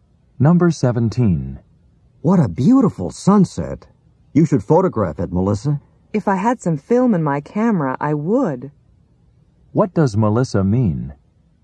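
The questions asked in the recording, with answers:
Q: What does Melissa mean?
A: She has no film in her camera, so she can't photograph it.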